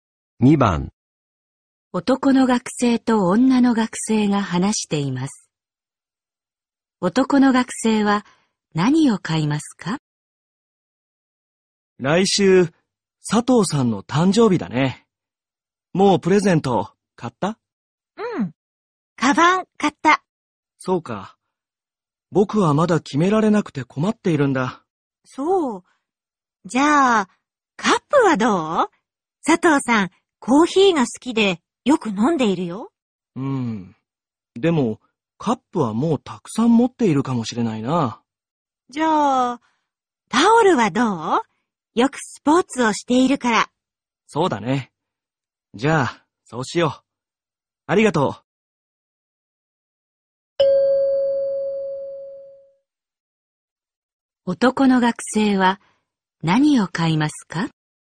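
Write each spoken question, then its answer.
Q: 男の学生は何を買いますか?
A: タオル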